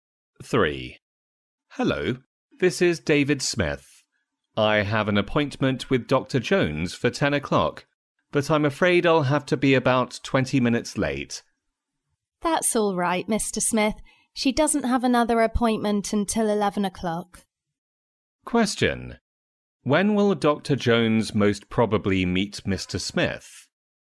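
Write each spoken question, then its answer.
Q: When will Dr. Jones most probably meet Mr. Smith?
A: At about 10:20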